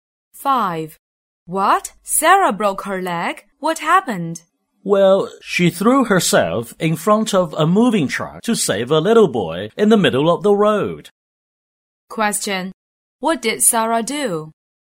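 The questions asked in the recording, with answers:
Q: What did Sarah do?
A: She saved a little boy from a moving truck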